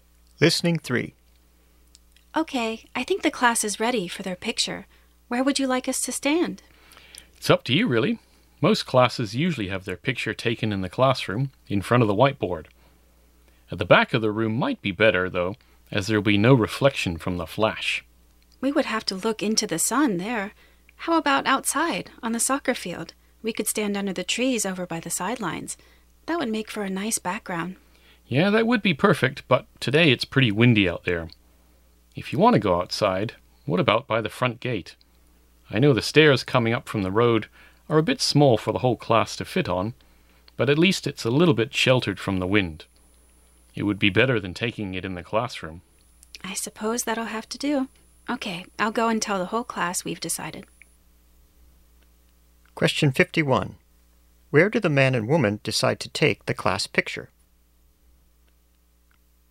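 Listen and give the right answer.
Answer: By the front gate, on the stairs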